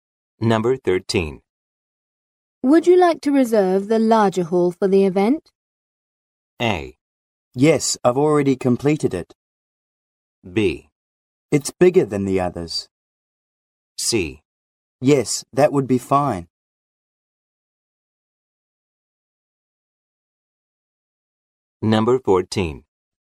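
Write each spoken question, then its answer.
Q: Would you like to reserve the larger hall for the event?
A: C: Yes, that would be fine.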